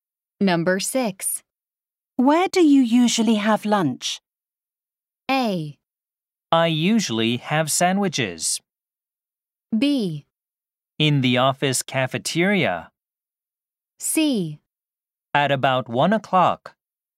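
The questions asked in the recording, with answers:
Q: Where do you usually have lunch?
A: B: In the office cafeteria.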